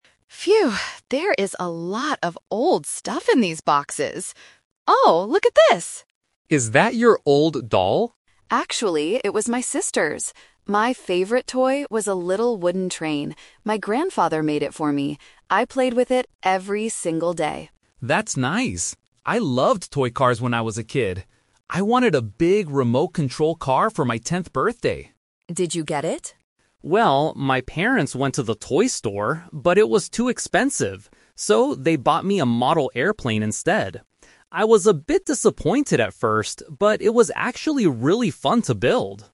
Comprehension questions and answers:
Listen to two friends, Lisa and Mark, talking while cleaning up a room. Then, read the questions below and choose the correct answer (A, B, or C) for each question.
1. What was Lisa's favorite toy when she was a child?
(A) A doll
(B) A wooden train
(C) A teddy bear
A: (B) A wooden train

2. What did Mark want to get for his tenth birthday?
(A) A remote-control car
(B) A model airplane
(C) A video game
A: (A) A remote-control car

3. How did Mark feel about the toy his parents bought him?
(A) He thought it was too expensive.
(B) He didn't like playing with it at all.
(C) He enjoyed putting it together.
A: (C) He enjoyed putting it together.

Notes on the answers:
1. Lisa clearly states, "My favorite toy was a little wooden train." Option (A) is a trap; a doll is mentioned, but Lisa says it belonged to her sister. Option (C) is a plausible childhood toy, but it is never mentioned in the conversation.
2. Mark says, "I wanted a big remote-control car for my tenth birthday." Option (B) is a trap; a model airplane is what he actually received, not what he initially wanted. Option (C) is plausible for a 10-year-old boy, but it is not mentioned.
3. Mark says about the model airplane, "...it was actually really fun to build" (which matches "putting it together"). Option (A) is a trap; the word "expensive" is mentioned, but it describes the remote-control car, not the airplane. Option (B) is a trap; he was disappointed "at first," but he ended up having fun with it.

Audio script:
Lisa: Phew, there is a lot of old stuff in these boxes. Oh, look at this!
Mark: Is that your old doll?
Lisa: Actually, it was my sister's. My favorite toy was a little wooden train. My grandfather made it for me. I played with it every single day.
Mark: That's nice. I loved toy cars when I was a kid. I wanted a big remote-control car for my tenth birthday.
Lisa: Did you get it?
Mark: Well, my parents went to the toy store, but it was too expensive. So, they bought me a model airplane instead.

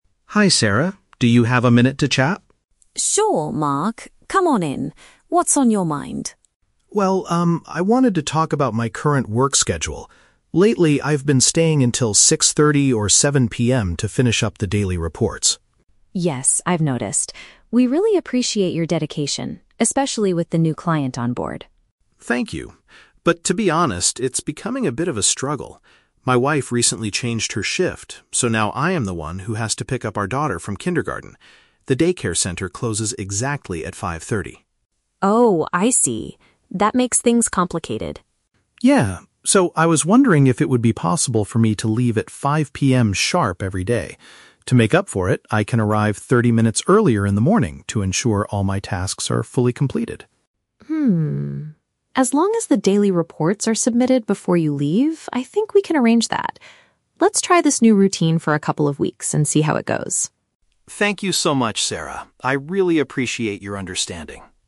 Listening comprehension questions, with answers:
Listen to the conversation between an employee (Mark) and his manager (Sarah), and choose the correct answer (A, B, or C) for each question.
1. Why is Mark having a conversation with Sarah?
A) He wants to share his ideas about the new client.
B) He wants to stop working late in the evenings.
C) He wants to ask for a salary increase for his hard work.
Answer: B) He wants to stop working late in the evenings.

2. What is the main reason for Mark's request?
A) His wife is sick and needs someone to take care of her.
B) He has to attend an evening class that starts at 5:30.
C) He needs to collect his child before the facility closes.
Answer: C) He needs to collect his child before the facility closes.

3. What solution does Mark offer to maintain his productivity?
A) He promises to arrive at the office earlier in the morning.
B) He agrees to finish the daily reports at home after dinner.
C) He suggests asking other team members to help him.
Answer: A) He promises to arrive at the office earlier in the morning.

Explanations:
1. Mark mentions he has been staying until 6:30 or 7:00 PM and asks if he can "leave at 5:00 PM sharp." This means he wants to stop doing overtime.
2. Mark says he has to "pick up our daughter from kindergarten" because the "daycare center closes exactly at 5:30." "Collect his child" is a synonym for picking up his daughter.
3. Mark says, "I can arrive 30 minutes earlier in the morning to ensure all my tasks are fully completed."

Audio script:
Mark: Hi, Sarah. Do you have a minute to chat?
Sarah: Sure, Mark. Come on in. What's on your mind?
Mark: Well, um, I wanted to talk about my current work schedule. Lately, I've been staying until 6:30 or 7:00 PM to finish up the daily reports.
Sarah: Yes, I've noticed. We really appreciate your dedication, especially with the new client onboard.
Mark: Thank you. But, to be honest, it's becoming a bit of a struggle. My wife recently changed her shift, so now I am the one who has to pick up our daughter from kindergarten. The daycare center closes exactly at 5:30.
Sarah: Oh, I see. That makes things complicated.
Mark: Yeah. So, I was wondering if it would be possible for me to leave at 5:00 PM sharp every day. To make up for it, I can arrive 30 minutes earlier in the morning to ensure all my tasks are fully completed.
As long as the daily reports are submitted before you leave, I think we can arrange that. Let's try this new routine for a couple of weeks and see how it goes.

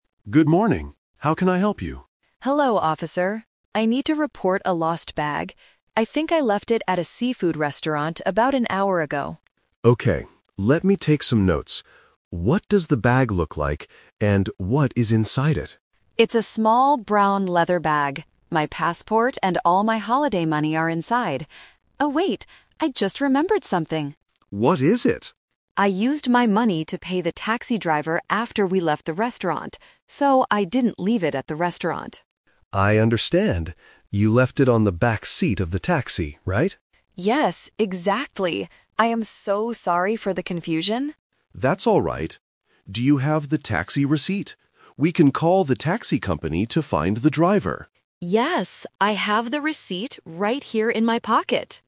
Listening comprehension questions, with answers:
Listen to a conversation between a tourist and a police officer. Choose the correct answer (A, B, or C) for each question.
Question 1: Where did the tourist actually lose the bag?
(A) At a seafood restaurant.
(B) In a taxi.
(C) At the police station.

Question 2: What does the lost bag look like?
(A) It is a small brown bag.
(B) It is a large black bag.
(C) It is a small yellow bag.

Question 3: How will the police officer try to help the tourist?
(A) By driving to the seafood restaurant.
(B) By giving the tourist some holiday money.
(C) By using a receipt to call the taxi company.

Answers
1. (B) In a taxi.
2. (A) It is a small brown bag.
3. (C) By using a receipt to call the taxi company.

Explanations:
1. This is The Twist. Initially, the tourist thinks they left it at a seafood restaurant, but then remembers they paid the taxi driver. The police ask again: "You left it on the back seat of the taxi, right?" and the tourist confirms, "Yes, exactly!". Answer (A) is the original intended trap. Answer (C) is where they are standing and talking.
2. The tourist describes their bag as: "It's a small brown leather bag." Answer (A) is a perfect match. Answers (B) and (C) are incorrect colors and sizes (a basic A2 vocabulary trap).
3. The police ask if the tourist has a taxi receipt and say: "We can call the taxi company to find the driver." (We can call a taxi company to find a driver.) Answer (A) is a trap because the restaurant is the wrong location. Answer (B) is not in the text (the police don't give money).

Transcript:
Police Officer: Good morning. How can I help you?
Tourist: Hello, officer. I need to report a lost bag. I think I left it at a seafood restaurant about an hour ago.
Police Officer: Okay. Let me take some notes. What does the bag look like? And what is inside it?
Tourist: It's a small brown leather bag. My passport and all my holiday money are inside. Oh, wait... I just remembered something!
Police Officer: What is it?
Tourist: I used my money to pay the taxi driver after we left the restaurant. So, I didn't leave it at the restaurant.
Police Officer: I understand. You left it on the back seat of the taxi, right?
Tourist: Yes, exactly! I am so sorry for the confusion.
Do you have the taxi receipt? We can call the taxi company to find the driver.

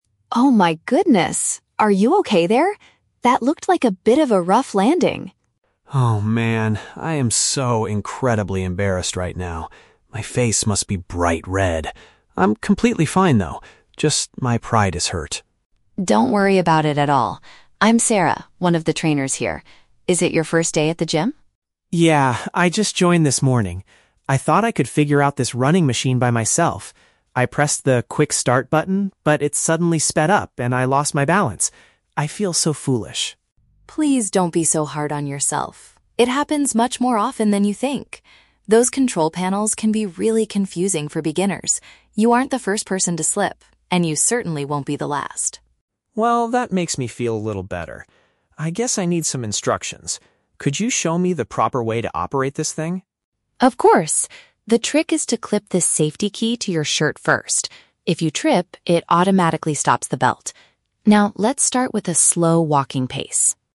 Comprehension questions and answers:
Listen to the conversation between a new gym member and a personal trainer. Choose the correct answer (A, B, or C) for each question.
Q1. How does the man feel about the incident?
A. He is worried because he suffered a serious physical injury.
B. He is angry at the gym staff for buying a complicated machine.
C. He feels extremely shy and awkward about what just happened.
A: C. He feels extremely shy and awkward about what just happened.

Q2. What caused the man to lose his balance?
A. The equipment began moving much faster than he expected.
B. He forgot to attach the safety key to his clothing before running.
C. He was wearing the wrong type of shoes for a workout.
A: A. The equipment began moving much faster than he expected.

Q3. What does the trainer say to comfort the man?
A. She offers him a free personal training session for his first day.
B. She points out that many new members make the exact same mistake.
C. She tells him the machine is broken and needs to be repaired.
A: B. She points out that many new members make the exact same mistake.

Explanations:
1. The Key: Mark says, "I am so incredibly embarrassed right now," and his face is "bright red." He also says, "I feel so foolish." Option C is a perfect paraphrase of these feelings. The Trap (A): The audio mentions that his "pride is hurt," but he explicitly states, "I'm completely fine, though." He is not physically injured. The Plausible (B): The machine's control panel is described as "confusing," which might make someone angry, but Mark blames himself, not the staff.
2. The Key: Mark explains that he pressed a button and "it suddenly sped up." This means it moved much faster than he thought it would. The Trap (B): The trainer mentions the "safety key" and tells him to clip it to his shirt, but this is her advice for the future. It was not the cause of his fall. The Plausible (C): Wearing bad shoes is a common reason for slipping at the gym, but it is never mentioned in the audio.
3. The Key: Sarah tells him, "It happens much more often than you think" and "You aren't the first person to slip." This means many other beginners do the same thing. The Trap (A): She introduces herself as "one of the trainers" and asks if it is his "first day," but she never offers him a free training session. The Plausible (C): If a machine suddenly speeds up, it might be broken, but Sarah explains that the panels are just "confusing for beginners," not broken.

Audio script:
Sarah: Oh my goodness! Are you okay there? That looked like a bit of a rough landing.
Mark: Oh, man... I am so incredibly embarrassed right now. My face must be bright red. I'm completely fine, though. Just my pride is hurt.
Sarah: Don't worry about it at all. I'm Sarah, one of the trainers here. Is it your first day at the gym?
Mark: Yeah, I just joined this morning. I thought I could figure out this running machine by myself. I pressed the 'quick start' button, but it suddenly sped up, and I lost my balance. I feel so foolish.
Sarah: Please don't be so hard on yourself. It happens much more often than you think! Those control panels can be really confusing for beginners. You aren't the first person to slip, and you certainly won't be the last.
Mark: Well, that makes me feel a little better. I guess I need some instructions. Could you show me the proper way to operate this thing?
Sarah: Of course! The trick is to clip this safety key to your shirt first. If you trip, it automatically stops the belt. Now, let's start with a slow walking pace...

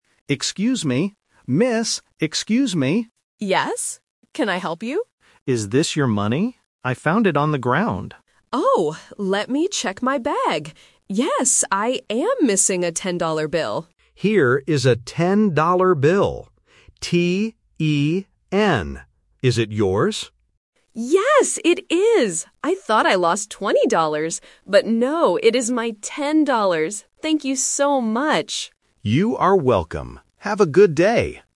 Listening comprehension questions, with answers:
Listen to the conversation and choose the correct answer (A, B, or C).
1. What did the man find on the ground?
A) A bag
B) A wallet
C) Some money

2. How much money did the woman lose?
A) $10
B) $20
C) $2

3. How does the man spell the value of the bill?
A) T-W-E-N-T-Y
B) T-E-N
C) T-W-O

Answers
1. C) Some money
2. A) $10
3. B) T-E-N

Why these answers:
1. The man asks, "Is this your money? I found it on the ground" (The Key). The woman mentions her bag ("Let me check my bag"), but it is not what the man found (The Trap). A wallet is not mentioned.
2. The woman says, "I am missing a ten-dollar bill" and confirms it at the end (The Key). She says, "I thought I lost twenty dollars" (The Trap), but she actually lost ten.
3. When the man shows the bill, he spells the word: "T-E-N" (The Key) to make sure they are talking about the same bill.

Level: A1

